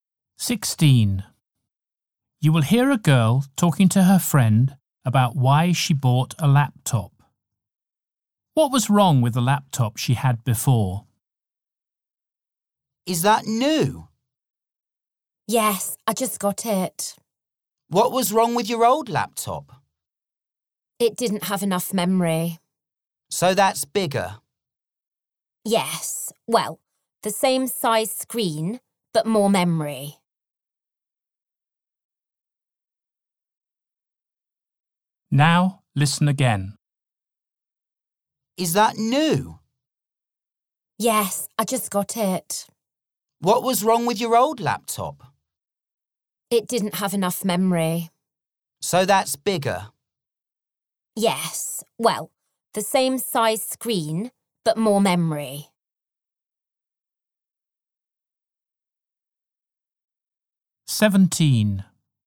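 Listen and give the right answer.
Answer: It didn't have enough memory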